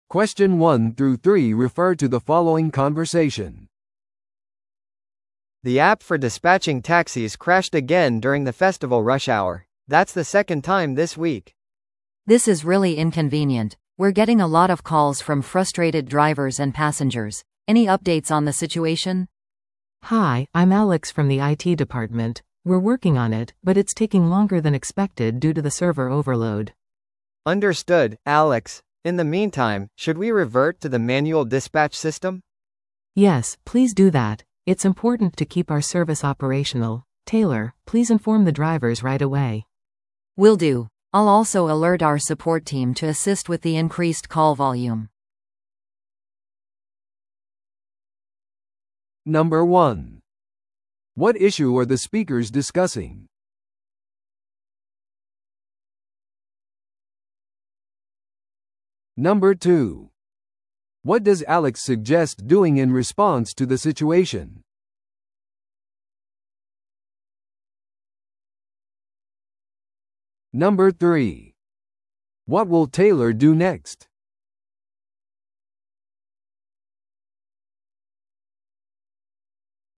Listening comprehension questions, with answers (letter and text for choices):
Listen to the audio below and answer the questions.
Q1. What issue are the speakers discussing?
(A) お祭りの活動の遅れ。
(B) タクシー料金の過大請求。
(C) 交通の渋滞の増加。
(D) 故障しているタクシーアプリ。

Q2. What does Alex suggest doing in response to the situation?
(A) アプリが自動的に再起動するのを待つ。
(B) 手動の配車システムに切り替える。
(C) お祭りの主催者に連絡を取る。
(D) 影響を受けた顧客に割引を提供する。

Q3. What will Taylor do next?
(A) タクシーアプリを修理する。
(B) 手動システムについてドライバーに知らせる。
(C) お祭りの混雑を案内する。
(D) サーバーの過負荷状態を監視する。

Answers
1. (D) 故障しているタクシーアプリ。
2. (B) 手動の配車システムに切り替える。
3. (B) 手動システムについてドライバーに知らせる。

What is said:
A: The app for dispatching taxis crashed again during the festival rush hour. That's the second time this week.
B: This is really inconvenient. We're getting a lot of calls from frustrated drivers and passengers. Any updates on the situation?
C: Hi, I'm Alex from the IT department. We're working on it, but it's taking longer than expected due to the server overload.
A: Understood, Alex. In the meantime, should we revert to the manual dispatch system?
C: Yes, please do that. It's important to keep our service operational. Taylor, please inform the drivers right away.
B: Will do. I'll also alert our support team to assist with the increased call volume.